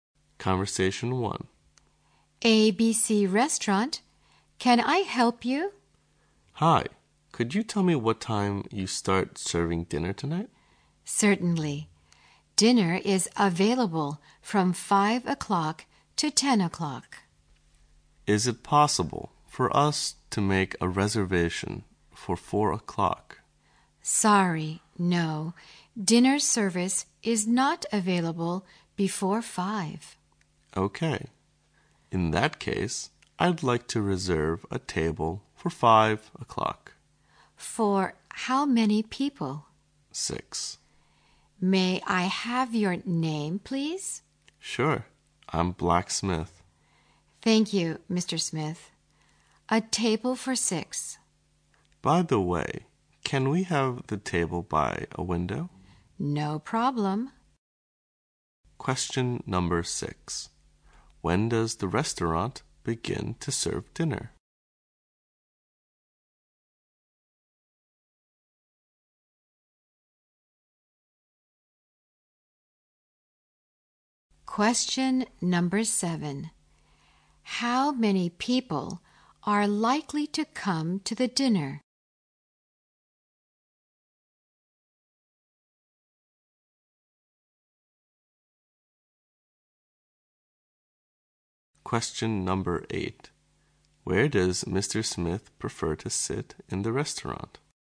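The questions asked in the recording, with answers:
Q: When does the restaurant begin to serve dinner?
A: At 5 o'clock

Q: Smith prefer to sit in the restaurant?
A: By a window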